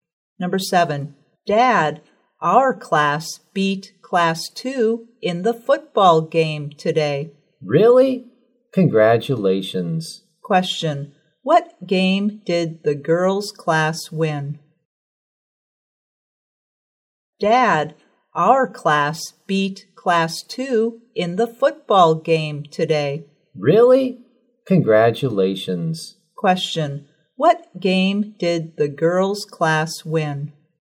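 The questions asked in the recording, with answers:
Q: what game did the girls' class win?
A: A football game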